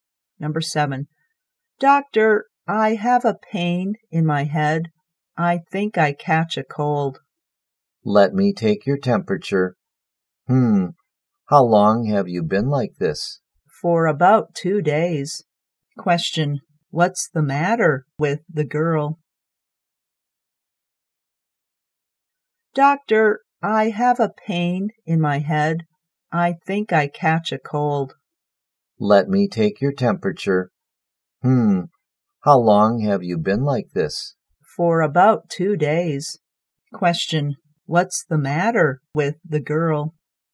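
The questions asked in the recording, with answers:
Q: What's the matter with the girl?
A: She has a headache; she caught a cold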